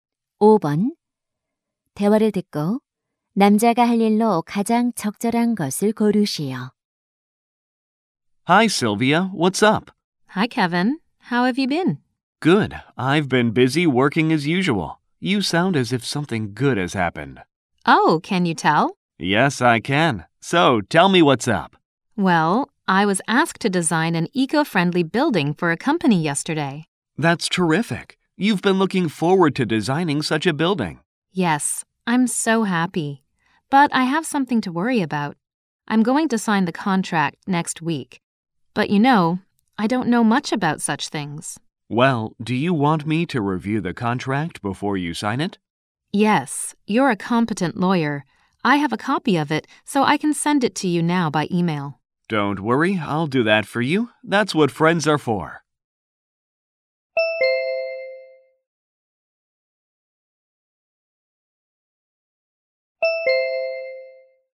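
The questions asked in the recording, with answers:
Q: 대화를 듣고 남자가 할 일로 가장 적절한 것을 고르시오.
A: 계약서 검토해 주기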